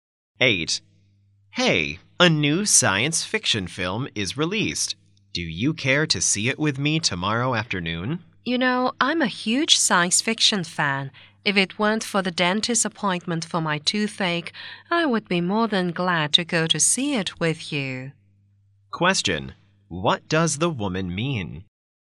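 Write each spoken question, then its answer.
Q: What does the woman mean?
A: She can't go because of a dentist appointment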